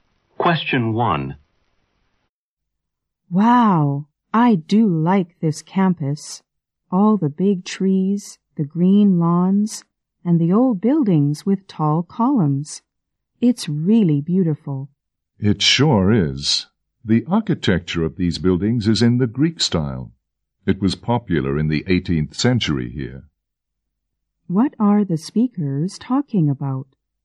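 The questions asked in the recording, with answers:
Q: What are the speakers talking about?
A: The beautiful campus and its Greek-style architecture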